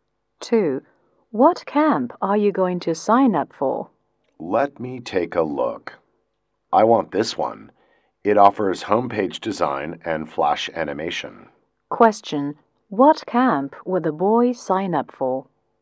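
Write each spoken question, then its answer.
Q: What camp would the boy sign up for?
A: A computer camp offering homepage design and flash animation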